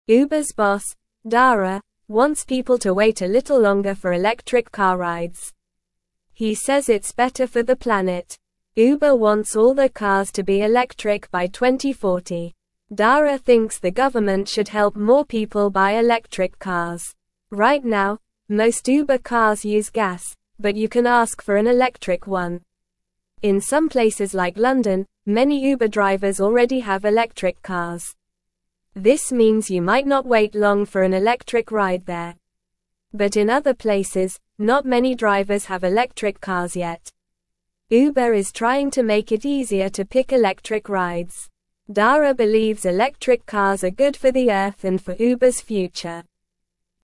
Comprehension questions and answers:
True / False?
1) Uber hopes all their cars will be electric by the year 2030.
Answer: False

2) Uber is working to make it easier to choose electric rides.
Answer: True

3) Dara believes electric cars are good for the Earth and for Uber's future.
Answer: True

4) The boss of Uber wants fewer people to ride in electric cars.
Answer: False

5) In London, few Uber drivers already have electric cars.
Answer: False

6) Dara thinks the government should help people buy electric cars.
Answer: True

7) Most Uber cars use gas, but you can ask for an electric one.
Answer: True

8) What does Uber's boss want people to wait for a little longer?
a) Electric car rides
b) Bus rides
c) Train rides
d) Bike rides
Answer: a) Electric car rides

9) By what year does Uber want all their cars to be electric?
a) 2025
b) 2040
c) 2030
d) 2050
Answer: b) 2040

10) What does Dara think the government should help more people buy?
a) Electric cars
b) Bicycles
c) Scooters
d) Motorcycles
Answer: a) Electric cars

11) What kind of cars does Uber want all their cars to be by 2040?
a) Gas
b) Hybrid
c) Diesel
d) Electric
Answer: d) Electric

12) In which city do many Uber drivers already have electric cars?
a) New York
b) Paris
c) Tokyo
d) London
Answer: d) London

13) Why does Dara believe electric cars are good for the Earth?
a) They are loud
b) They are better for the planet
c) They are slow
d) They use a lot of gas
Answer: b) They are better for the planet

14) What can you ask for if you want an electric Uber ride?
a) Gas one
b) Bike one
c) Electric one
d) Train one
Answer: c) Electric one

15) What is Uber trying to make easier to pick?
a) Gas rides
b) Bike rides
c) Electric rides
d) Train rides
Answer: c) Electric rides

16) Uber's boss, Dara, wants people to wait a little longer for electric car (1)______.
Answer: rides

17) Uber wants all their (2)______ to be electric by 2040.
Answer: cars

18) (3)______ thinks the government should (4)______ more people buy electric cars.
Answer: Dara

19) (3)______ thinks the government should (4)______ more people buy electric cars.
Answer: help

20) In some places like London, many (5)______ drivers already have (6)______ cars.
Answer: Uber

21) In some places like London, many (5)______ drivers already have (6)______ cars.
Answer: electric

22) Uber is trying to make it easier to (7)______ electric rides.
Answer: pick

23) Dara (8)______ electric cars are good for the Earth and for Uber's future.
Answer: believes

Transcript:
Uber's boss, Dara, wants people to wait a little longer for electric car rides. He says it's better for the planet. Uber wants all their cars to be electric by 2040. Dara thinks the government should help more people buy electric cars. Right now, most Uber cars use gas, but you can ask for an electric one.
In some places like London, many Uber drivers already have electric cars. This means you might not wait long for an electric ride there. But in other places, not many drivers have electric cars yet. Uber is trying to make it easier to pick electric rides.

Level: Level 1

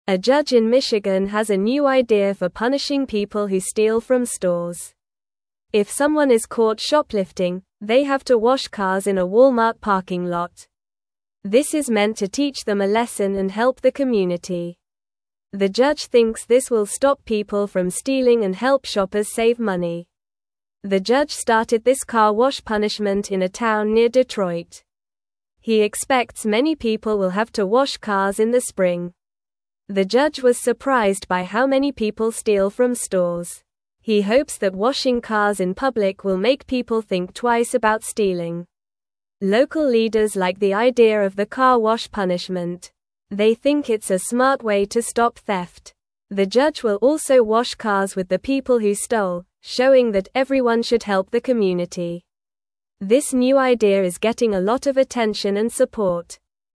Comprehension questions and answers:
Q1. What is the new punishment for shoplifting in Michigan?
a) Cleaning houses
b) Washing cars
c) Picking up trash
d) Mowing lawns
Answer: b) Washing cars

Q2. Where do people have to wash cars as part of their punishment?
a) Walmart parking lot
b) School parking lot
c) Library parking lot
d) Hospital parking lot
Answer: a) Walmart parking lot

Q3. Who came up with the idea for this punishment?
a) A teacher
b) A judge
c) A police officer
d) A mayor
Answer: b) A judge

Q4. What does the judge hope washing cars will do?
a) Make people laugh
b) Help them find jobs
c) Make them famous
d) Teach a lesson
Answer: d) Teach a lesson

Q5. In which town did the judge start this car wash punishment?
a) Near Chicago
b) Near New York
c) Near Detroit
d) Near Los Angeles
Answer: c) Near Detroit

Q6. What does the judge plan to do while people wash cars?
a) Watch them from a distance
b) Give them money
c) Take pictures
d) Wash cars with them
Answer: d) Wash cars with them

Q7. Why is this new idea getting attention?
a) It is very funny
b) It is very easy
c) It is different and helpful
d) It is very expensive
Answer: c) It is different and helpful

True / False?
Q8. People who steal from stores will wash cars in a Walmart parking lot.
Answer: True

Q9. This new punishment idea is not getting much attention.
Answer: False

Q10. The judge wants this punishment to teach a lesson and help the community.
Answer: True

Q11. A judge in Michigan has an old way to punish shoplifters.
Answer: False

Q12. The car wash punishment started in a city near Chicago.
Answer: False

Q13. Local leaders support the idea of washing cars as punishment.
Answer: True

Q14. The judge is surprised by how many people steal from stores.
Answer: True

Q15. What new punishment does the judge in Michigan have for shoplifters?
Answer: The judge makes shoplifters wash cars.

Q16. Where do the people have to wash cars as part of their punishment?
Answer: They have to wash cars in a Walmart parking lot.

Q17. Why does the judge think washing cars will help people?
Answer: The judge thinks it will teach them a lesson and help the community.

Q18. In which town near Detroit did the judge start this car wash punishment?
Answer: The judge started this car wash punishment in a town near Detroit, but the article does not give the town's name.

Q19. What does the judge do while the people wash cars?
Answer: The judge washes cars with the people who stole.

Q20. Why is this new idea getting a lot of attention?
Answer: This new idea is getting a lot of attention because it is different and many people support it.

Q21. A judge in Michigan has a new idea for punishing people who steal from (1)______.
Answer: stores

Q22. If someone is caught shoplifting, they have to wash cars in a Walmart (2)______ lot.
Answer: parking

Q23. This is meant to teach them a (3)______ and help the community.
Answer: lesson

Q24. The judge thinks this will stop people from stealing and help shoppers save (4)______.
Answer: money

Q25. The judge started this car (5)______ punishment in a town near Detroit.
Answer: wash

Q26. He expects many people will have to wash (6)______ in the (7)______.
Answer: cars

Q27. He expects many people will have to wash (6)______ in the (7)______.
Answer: spring

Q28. He hopes that washing cars in public will make people (8)______ twice about stealing.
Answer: think

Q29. (9)______ leaders like the idea of the car wash punishment.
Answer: Local

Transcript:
A judge in Michigan has a new idea for punishing people who steal from stores. If someone is caught shoplifting, they have to wash cars in a Walmart parking lot. This is meant to teach them a lesson and help the community. The judge thinks this will stop people from stealing and help shoppers save money.
The judge started this car wash punishment in a town near Detroit. He expects many people will have to wash cars in the spring. The judge was surprised by how many people steal from stores. He hopes that washing cars in public will make people think twice about stealing.
Local leaders like the idea of the car wash punishment. They think it's a smart way to stop theft. The judge will also wash cars with the people who stole, showing that everyone should help the community. This new idea is getting a lot of attention and support.

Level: Level 2

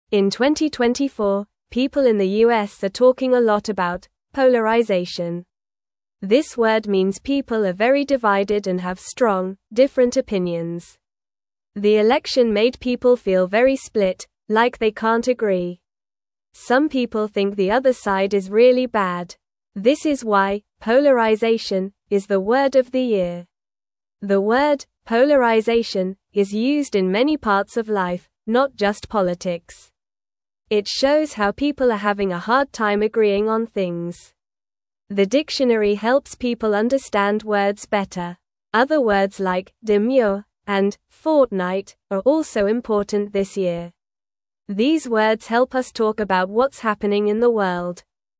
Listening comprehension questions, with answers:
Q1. In 2024, people in the U.S. are (1)______ a lot about "polarization."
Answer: talking

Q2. The (2)______ made people feel very split, like they can't (3)______.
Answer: election

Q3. The (2)______ made people feel very split, like they can't (3)______.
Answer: agree

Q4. Some people (4)______ the other side is really bad.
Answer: think

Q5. The word "polarization" is used in many parts of life, not just (5)______.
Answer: politics

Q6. The (6)______ helps people understand (7)______ better.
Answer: dictionary

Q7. The (6)______ helps people understand (7)______ better.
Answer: words

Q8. Other words like "demure" and "fortnight" are also (8)______ this year.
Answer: important

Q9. What does "polarization" mean?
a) People are happy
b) People are very divided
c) People are sleeping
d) People are eating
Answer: b) People are very divided

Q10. What year is mentioned in the article?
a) 2023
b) 2025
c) 2022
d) 2024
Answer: d) 2024

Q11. What do people in the U.S. feel about each other?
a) They feel united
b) They feel split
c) They feel sleepy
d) They feel hungry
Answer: b) They feel split

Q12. What is one reason people use the word "polarization"?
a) To show strong opinions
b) To tell jokes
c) To sing songs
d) To play games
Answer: a) To show strong opinions

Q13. What helps people understand words better?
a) The dictionary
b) A toy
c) A book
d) A movie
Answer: a) The dictionary

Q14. Which word is mentioned in the article besides "polarization"?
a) Happy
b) Fast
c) Big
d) Demure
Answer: d) Demure

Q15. What does the article say about agreeing?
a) It is easy for people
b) It is funny for people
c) It is hard for people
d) It is boring for people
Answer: c) It is hard for people

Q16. What is the main topic of the article?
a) Animals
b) Food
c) Polarization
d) Travel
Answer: c) Polarization

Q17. Other words like "assertive" and "decade" are also important this year.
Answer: False

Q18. 5. "Polarization" is the word of the year in 2024.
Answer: True

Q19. The word "alignment" is used in many parts of life, not just politics.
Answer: False

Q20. The election made people feel very united.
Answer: False

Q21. 2. "Polarization" means people have weak and similar opinions.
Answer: False

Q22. People in the U.S. are talking about a word called "polarization."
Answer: True

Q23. Some people think the other side is really bad.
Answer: True

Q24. These words help us understand what is happening in the world.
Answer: True

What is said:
In 2024, people in the U.S. are talking a lot about "polarization." This word means people are very divided and have strong, different opinions. The election made people feel very split, like they can't agree. This is why "polarization" is the word of the year.
The word "polarization" is used in many parts of life, not just politics. It shows how people are having a hard time agreeing on things. The dictionary helps people understand words better. Other words like "demure" and "fortnight" are also important this year. These words help us talk about what's happening in the world.

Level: Level 1

